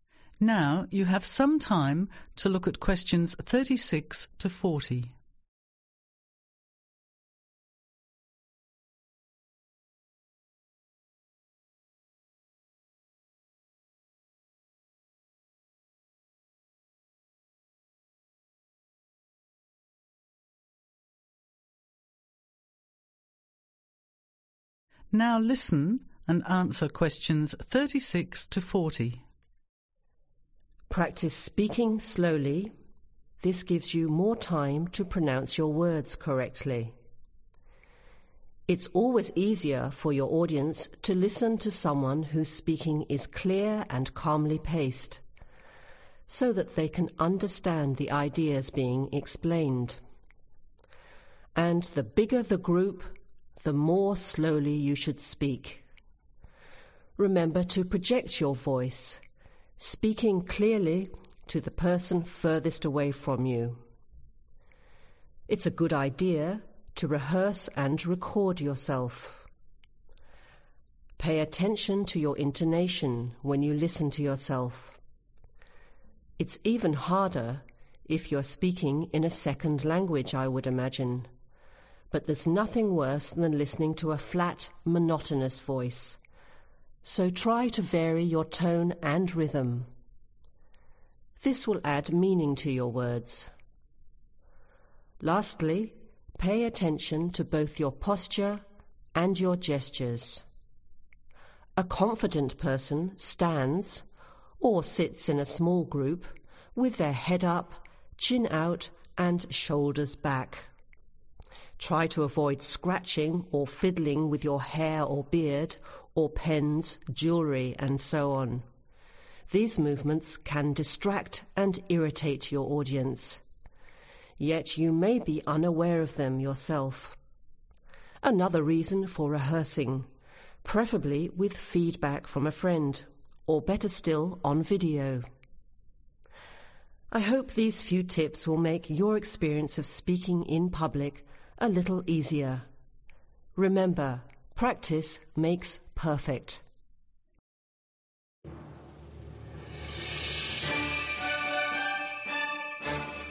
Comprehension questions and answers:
Complete the notes below. Write ONE WORD ONLY for each answer.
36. Speak slowly – this gives time for pronunciation and is easier for audience – bigger audience requires (36)............ speech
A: Slower

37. Project your voice – rehearse and (37)............ yourself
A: Record

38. Check intonation: varied tone and rhythm gives (38)............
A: Meaning

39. Lastly, think about your (39)............ and gestures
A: Posture

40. Avoid scratching and fiddling because this (40)............ and irritates your audience.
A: Distracts